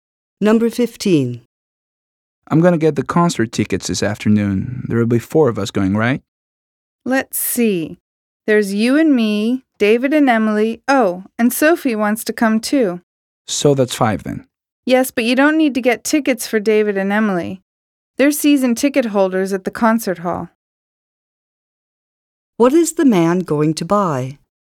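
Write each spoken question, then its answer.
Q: What is the man going to buy?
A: Three concert tickets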